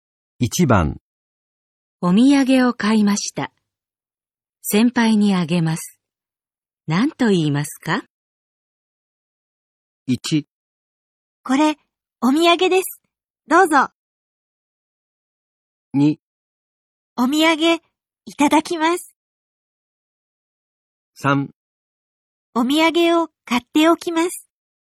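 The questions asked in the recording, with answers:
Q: お土産を買いました。先輩にあげます。何と言いますか?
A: 1: これ、お土産です。どうぞ。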